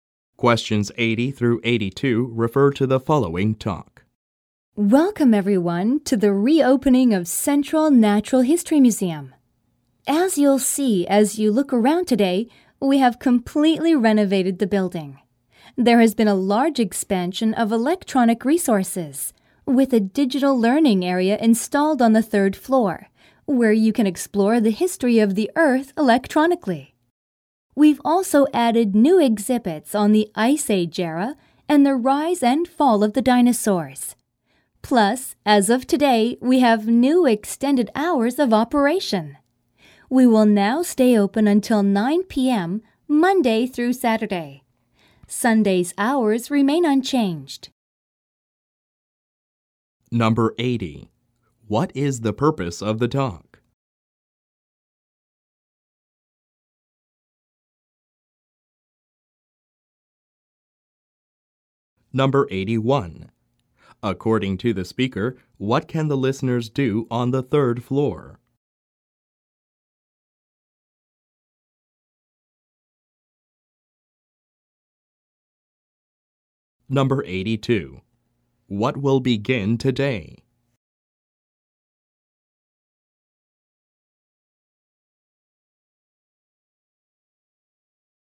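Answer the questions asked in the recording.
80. To welcome people to the reopening of a museum
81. Explore the history of the Earth electronically
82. Extended hours of operation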